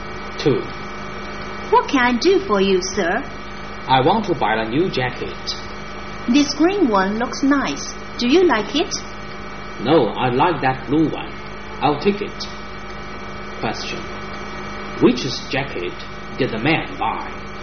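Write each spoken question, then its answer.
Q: Which jacket did the man buy?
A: The blue one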